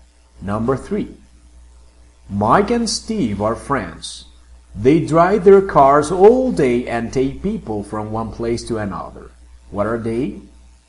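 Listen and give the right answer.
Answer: taxi drivers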